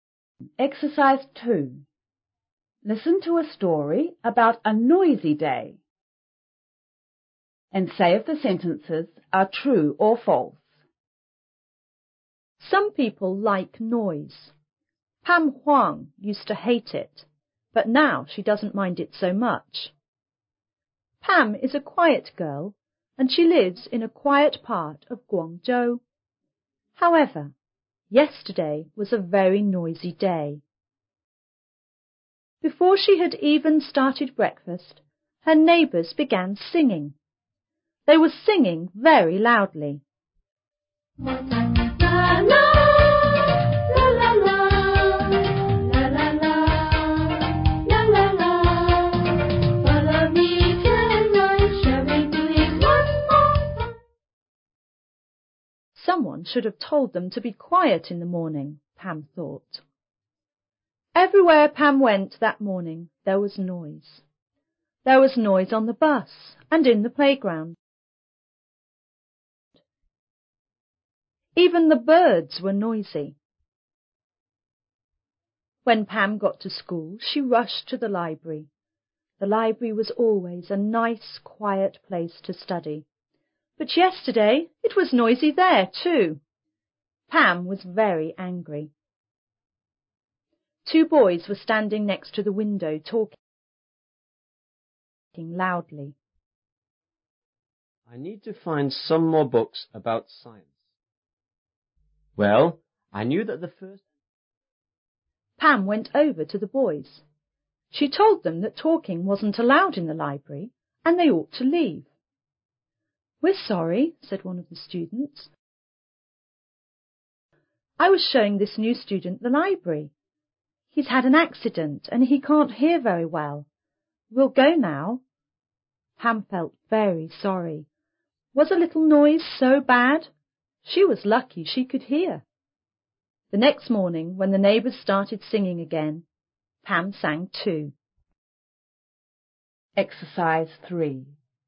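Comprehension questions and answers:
and say if the sentences are ture (T) or false (F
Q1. Pam Huang liked noise.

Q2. Pam's neighbours like to sing in the morning.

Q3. Pam rides her bike to school.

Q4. Pam likes the library because it's usually quiet.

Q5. The two boys in the library weren't noisy.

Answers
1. F
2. T
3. F
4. T
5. F

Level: 初中英语广州版5B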